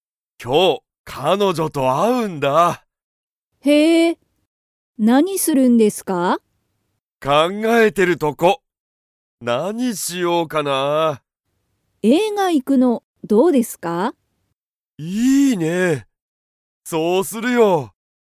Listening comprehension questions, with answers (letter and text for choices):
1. しんじは、彼女(かのじょ)と映画(えいが)に行(い)きますか?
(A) はい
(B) いいえ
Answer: (A) はい

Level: Level 1